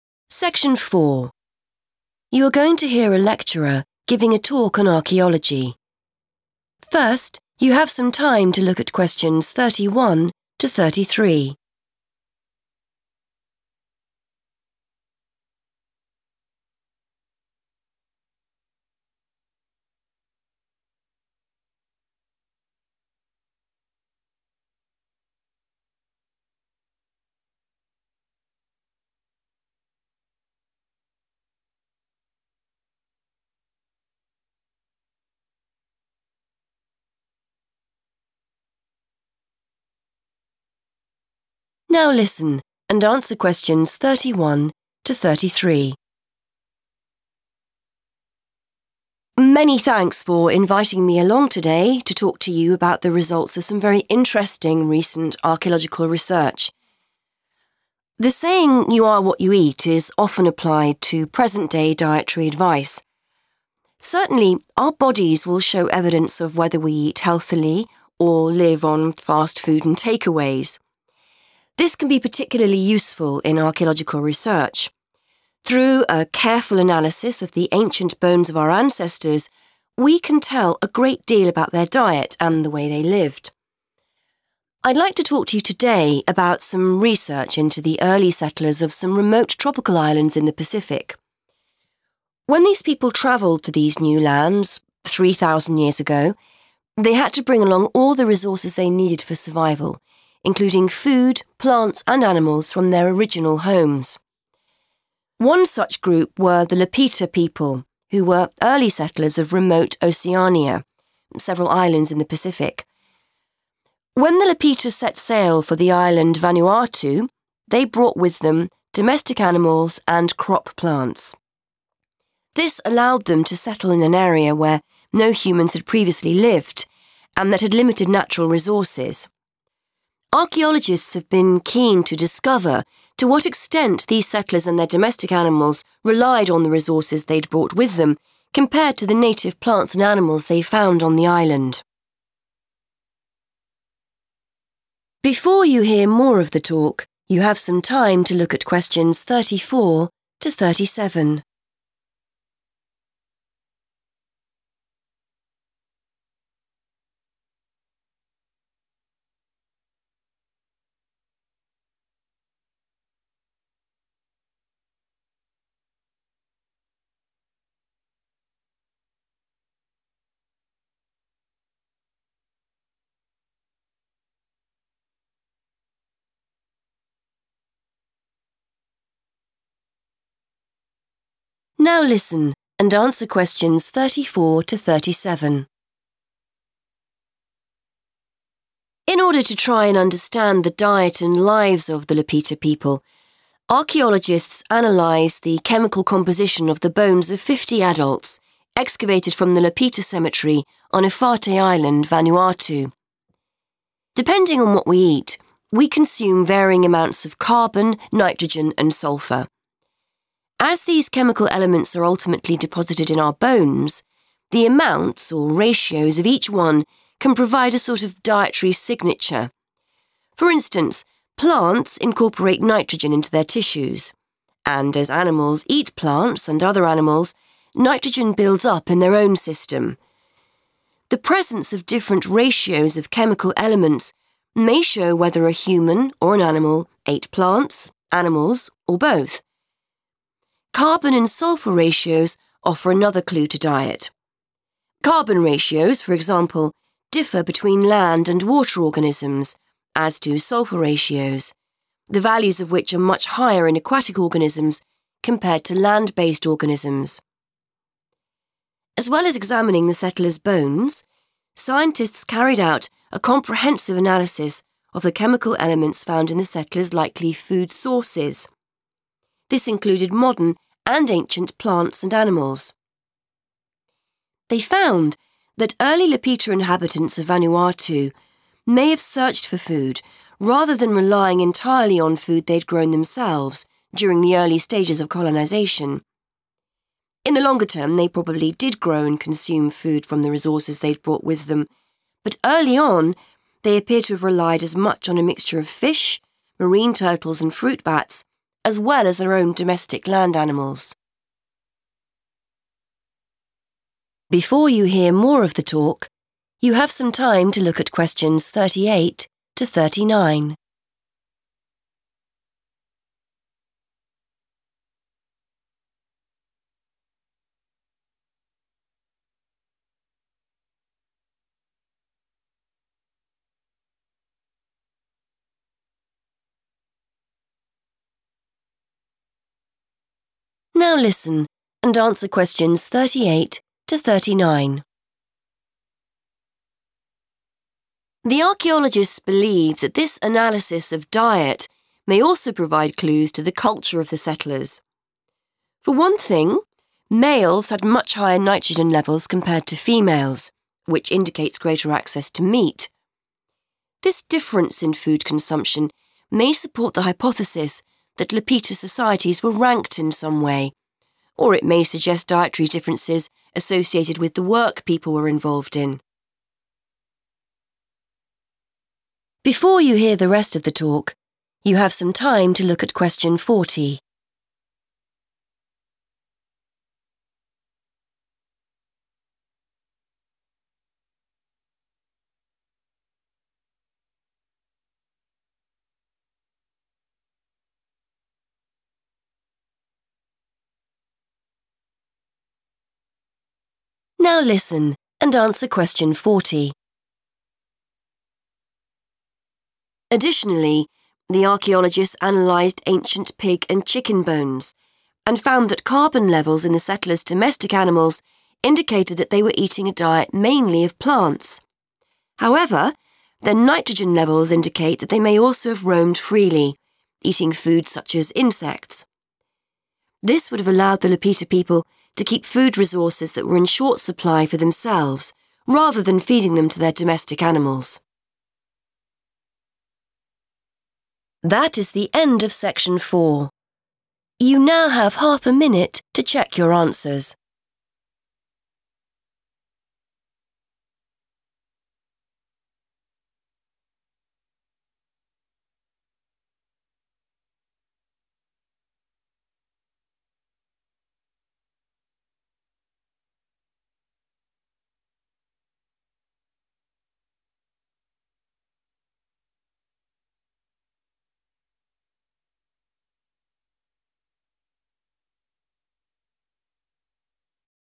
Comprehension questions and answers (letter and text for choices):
Choose the correct letter, A, B or C.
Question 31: According to the speaker,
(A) people were healthier in the past.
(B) ancient bones need to be handled with care.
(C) bones offer clues to a person's lifestyle.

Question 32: The island of Vanuatu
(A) was not always inhabited.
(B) had no food sources.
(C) was the only island in Remote Oceania.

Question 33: Archaeologists wanted to discover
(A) what resources were available on the island.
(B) if the settlers could rely entirely on local food sources.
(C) the extent to which the settlers ate food they had brought with them.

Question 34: Bones provide a dietary _____ of the things people ate.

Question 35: Different ratios of carbon and sulphur are found in organisms depending on whether they come from the land or _____ .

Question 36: Archaeologists analysed modern and _____ food sources for chemical elements.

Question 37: The settlers ate wild creatures as well as _____ .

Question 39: An analysis of the bones of men and women suggest that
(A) females ate more meat than males.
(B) diet could have been determined by the job the person did.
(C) some people held higher status than others.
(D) food was distributed equally amongst the settlers.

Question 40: The bones of pigs and chickens indicate that these animals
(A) only ate food provided by the settlers.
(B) were a main source of food for the settlers.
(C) probably did not consume the settlers' limited food supplies.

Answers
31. (C) bones offer clues to a person's lifestyle.
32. (A) was not always inhabited.
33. (C) the extent to which the settlers ate food they had brought with them.
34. signature
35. water
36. ancient
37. domestic land animals / domestic animals
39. (B) diet could have been determined by the job the person did.
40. (C) probably did not consume the settlers' limited food supplies.

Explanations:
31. The correct answer is correct because the speaker explains that old bones contain information about a person's life. By checking these bones, experts can find out what people ate and how they lived. The phrases 'diet' and 'way they lived' are used to describe a person's lifestyle.
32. The correct answer is A because the speaker explains that the Lapita people were the first to live on the island. The text specifically says they moved to a place where there were no humans before them. This matches the idea that the island was not always inhabited, or lived in.
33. The correct answer is C because the lecturer explains that researchers wanted to see how much the people and their animals used (relied on) the food and animals they brought from their old home instead of the natural food found on the island. The transcript uses the word 'extent' to talk about 'how much' they used these resources.
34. The correct answer is correct because the lecturer explains that chemicals from the food we eat stay in our bones. By measuring the amounts, or ratios, of these chemical elements, researchers can find a 'dietary signature' that tells them about the ancient people's diet.
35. The correct answer is based on the section of the talk where the lecturer explains how different chemical elements help identify what ancient people ate. The speaker mentions that both carbon and sulphur ratios help tell the difference between 'land and water organisms.' This comparison is used to track whether food sources came from the earth or from a lake or ocean (aquatic sources).
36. The correct answer is confirmed because the lecturer states that researchers looked at the chemicals in the foods the early settlers probably ate. They checked both 'modern' (new) and 'ancient' (very old) plants and animals to understand what was available back then.
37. The correct answer is correct because the transcript describes the different types of food the early settlers ate. It mentions they consumed wild creatures like fish, marine turtles, and fruit bats. However, it also mentions that they ate the animals they brought with them and raised on the land, which are referred to as 'domestic land animals'.
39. The correct answer is B and C because the chemical study found that men and women ate different amounts of meat. The speaker explains that this could be because some people were more important than others (ranking) or because people ate different foods based on their jobs (tasks).
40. The correct answer is C because the analysis of animal bones showed that pigs and chickens ate plants and insects on their own. By letting the animals walk around freely to find their own food, the settlers could keep their limited food for people instead of using it to feed the animals. In the text, 'in short supply' matches the idea of 'limited food supplies' in the question.

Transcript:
Lecturer: Many thanks for inviting me along today to talk to you about the results of some very interesting recent archaeological research.
The saying 'you are what you eat' is often applied to present day dietary advice. Certainly, our bodies will show evidence of whether we eat healthily or live on fast food and take-aways. This can be particularly useful in archaeological research; through a careful analysis of the ancient bones of our ancestors, we can tell a great deal about their diet and the way they lived.
I'd like to talk to you today about some research into the early settlers of some remote tropical islands in the Pacific. When these people travelled to these new lands 3,000 years ago, they had to bring along all the resources they needed for survival, including food, plants and animals from their original homes.
One such group were the Lapita people, who were early settlers of Remote Oceania - several islands in the Pacific. When the Lapita set sail for the island Vanuatu, they brought with them domestic animals and crop plants. This allowed them to settle in an area where no humans had previously lived and that had limited natural resources. Archaeologists have been keen to discover to what extent these settlers and their domestic animals relied on the resources they'd brought with them compared to the native plants and animals they found on the island.
In order to try and understand the diet and lives of the Lapita people, archaeologists analysed the chemical composition of the bones of 50 adults excavated from the Lapita cemetery on Efate Island, Vanuatu. Depending on what we eat, we consume varying amounts of carbon, nitrogen and sulphur. As these chemical elements are ultimately deposited in our bones, the amounts, or ratios, of each one can provide a sort of 'dietary signature'. For instance, plants incorporate nitrogen into their tissues, and as animals eat plants and other animals, nitrogen builds up in their own system. The presence of different ratios of chemical elements may show whether a human or an animal ate plants, animals or both. Carbon and sulphur ratios offer another clue to diet. Carbon ratios, for example, differ between land and water organisms, as do sulphur ratios, the values of which are much higher in aquatic organisms compared to land-based organisms. As well as examining the settlers' bones, scientists carried out a comprehensive analysis of the chemical elements found in the settlers' likely food sources. This included modern and ancient plants and animals. They found that early Lapita inhabitants of Vanuatu may have searched for food rather than relying entirely on food they had grown themselves during the early stages of colonisation. In the longer term, they probably did grow and consume food from the resources they'd brought with them, but early on they appear to have relied as much on a mixture of fish, marine turtles and fruit bats, as well as their own domestic land animals.
The archaeologists believe that this analysis of diet may also provide clues to the culture of the settlers. For one thing, males had much higher nitrogen levels compared to females, which indicates greater access to meat. This difference in food consumption may support the hypothesis that Lapita societies were ranked in some way, or it may suggest dietary differences associated with the work people were involved in.
Additionally, the archaeologists analysed ancient pig and chicken bones and found that carbon levels in the settlers' domestic animals indicated that they were eating a diet mainly of plants. However, their nitrogen levels indicate that they may also have roamed freely, eating foods such as insects. This would have allowed the Lapita people to keep food resources that were in short supply for themselves, rather than feeding them to their domestic animals.